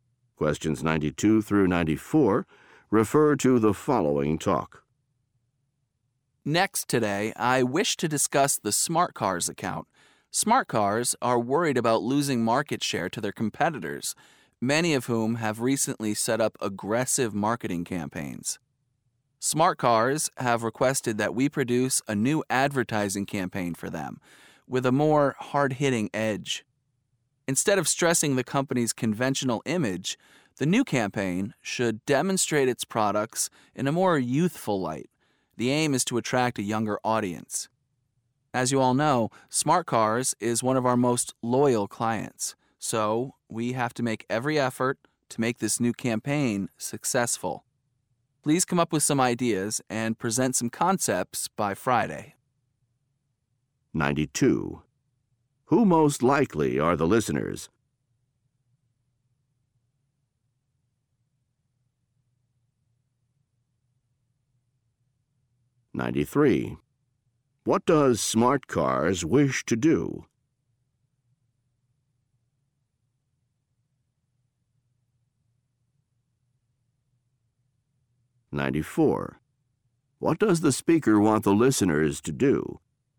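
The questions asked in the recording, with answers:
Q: Who most likely are the listeners?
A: Advertising agency staff

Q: What does Smart Cars wish to do?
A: Attract a younger audience

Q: What does the speaker want the listeners to do?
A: Present ideas and concepts by Friday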